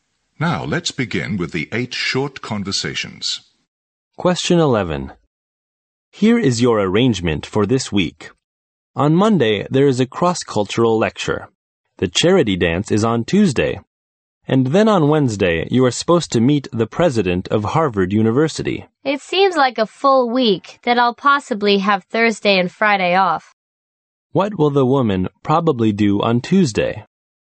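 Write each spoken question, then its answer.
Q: What will the woman probably do on Tuesday?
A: Attend the charity dance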